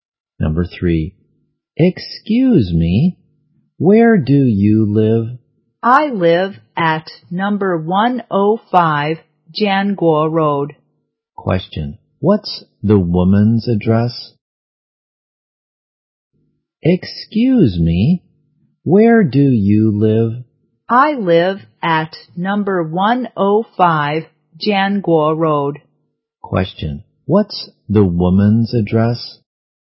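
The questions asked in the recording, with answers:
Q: Question, what's the woman's address?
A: Number 105 Janguo Road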